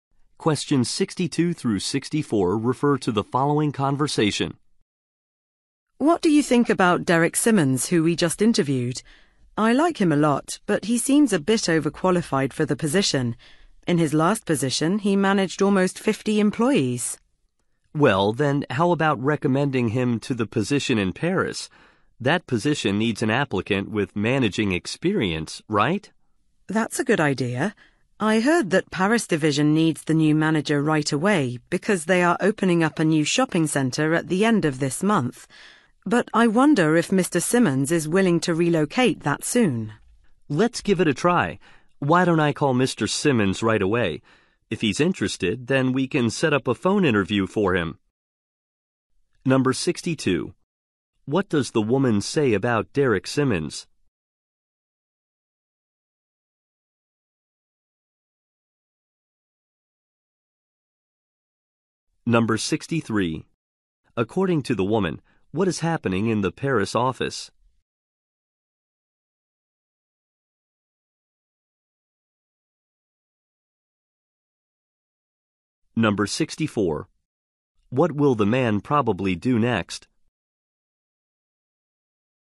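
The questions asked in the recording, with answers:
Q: What will the man probably do next?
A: Call Mr. Simmons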